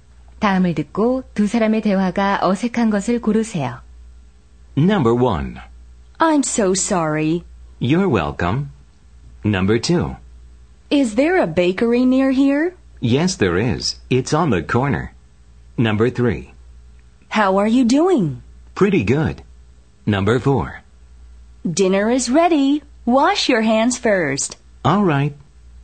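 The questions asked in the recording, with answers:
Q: 다음을 듣고 두 사람의 대화가 어색한 것을 고르세요.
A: 1: I'm so sorry. / You're welcome.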